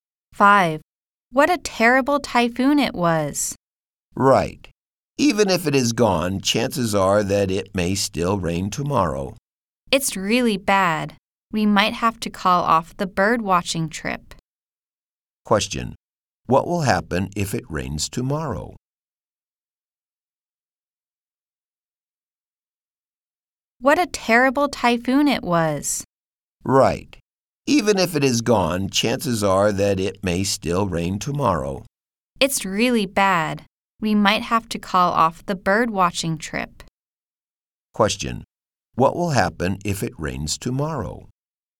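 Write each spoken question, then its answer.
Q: Question. What will happen if it rains tomorrow?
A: They might call off the bird watching trip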